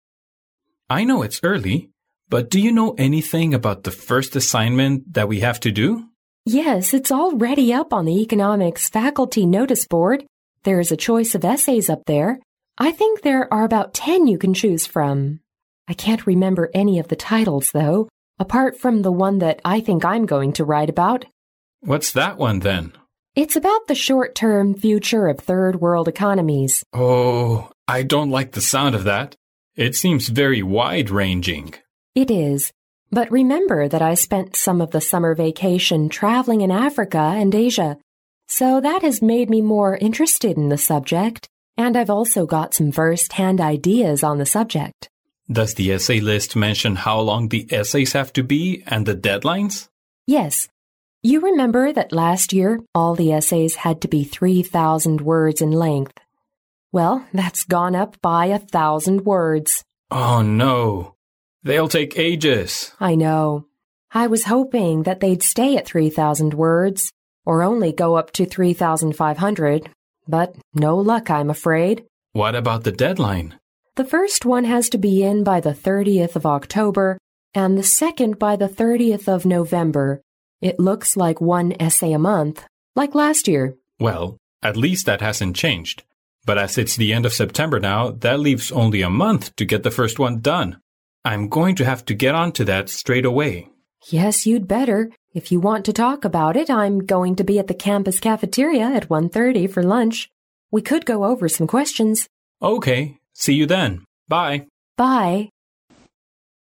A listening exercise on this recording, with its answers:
Listen to the conversation, mark each statement as either true (T) or false (F) according to your listening.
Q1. Students can choose from about ten essays titles for their first assignment.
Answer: 对

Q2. The woman is going to write about wide-ranging future of Africa and Asia economics.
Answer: 错

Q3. The essays are required to be 3500 words.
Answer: 错

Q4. The deadline for the second essay is the end of October.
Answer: 错

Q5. They will meet up at cafeteria to discuss the essay.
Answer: 对

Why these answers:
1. 根据录音中的"There's a choice of essays up there. I think there are about 10 you can choose from."意思就是,可以选择的论文题目有大约10个。因此,该判断正确。
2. 题目涉及到该女士的论文方向,录音中与此相关的表达是"It's about the short-term future of third world economies."由此可见,她的论文方向是"第三世界的经济学",而不仅仅特指"亚洲和非洲的经济学",题目犯了以偏概全的错误。因此,该判断错误。
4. 录音中提到"The first one has to be in by the 30th October and the second by the 30th November."由此可见,第二篇论文上交的截止日期是11月30号,而不是10月底。因此,该判断错误。

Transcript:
A
[听力原文] M: I know it's early but do you know anything about the first assignment that we have to do? W: Yes, it's already up on the economics faculty notice board. There's a choice of essays up there. I think there are about 10 you can choose from. I can't remember any of the titles though apart from the one that I think I'm going to write about. M: What's that one then? W: It's about the short-term future of third world economies. I don't like the sound of that. It seems very wide-ranging. W: It is but remember that I spent some of the summer vacation travelling in Africa and Asia so that has made me more interested in the subject and I've also got some firsthand ideas on the subject. M: Does the essay list mention how long the essays have to be and the deadlines? W: Yes. You remember that last year all the essays had to be 3,000 words in length? Well, that's gone up by a thousand words! M: Oh no! They'll take ages. W: I know. I was hoping that they'd stay at 3,000 words or only go up to 3,500, but no luck I'm afraid. M: What about the deadline? W: The first one has to be in by the 30th October and the second by the 30th November. It looks like one essay a month like last year. M: Well at least that hasn't changed but as it's the end of September now, that leaves only a month to get the first one done. I'm going to have got onto that straight away. W: Yes, you'd better. If you want to talk about it, I'm going to be at the campus cafeteria at 1:30 for lunch. We could go over some questions.